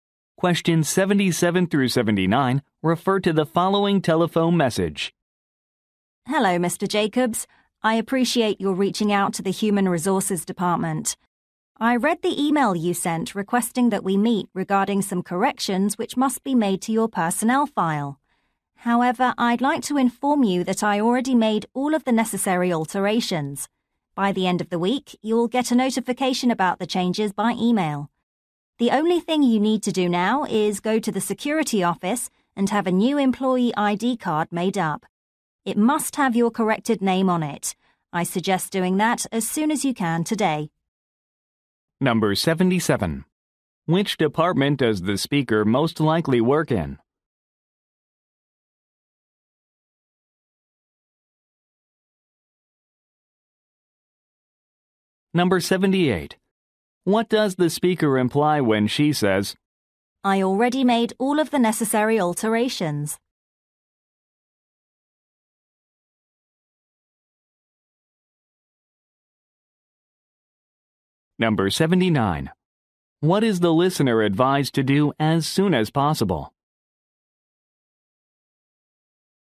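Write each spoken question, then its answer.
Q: Which department does the speaker most likely work in?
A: Human Resources

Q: What is the listener advised to do as soon as possible?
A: Get a new employee ID card made at the security office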